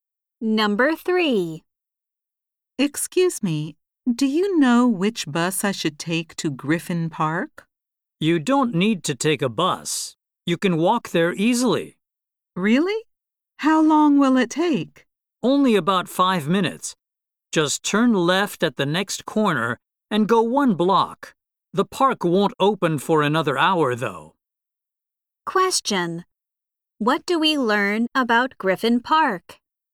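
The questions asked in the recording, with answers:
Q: What do we learn about Griffin Park?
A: It is within walking distance but won't open for another hour.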